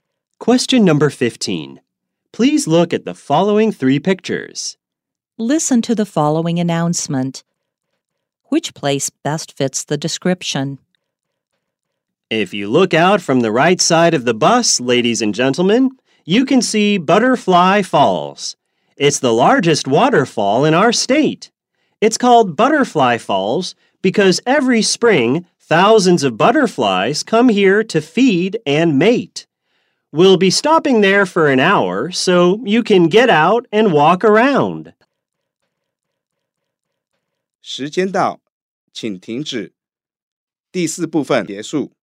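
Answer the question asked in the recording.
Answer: Butterfly Falls, a waterfall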